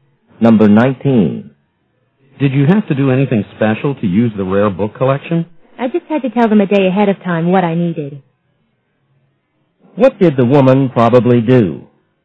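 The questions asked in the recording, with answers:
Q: What did the woman probably do?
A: Told the library a day ahead what books she needed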